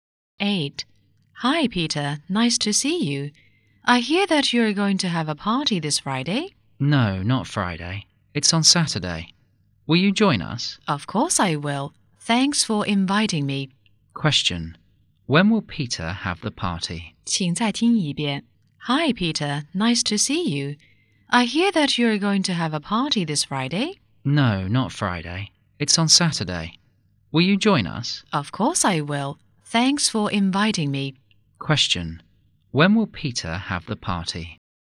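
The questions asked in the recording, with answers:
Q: When will Peter have the party?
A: On Saturday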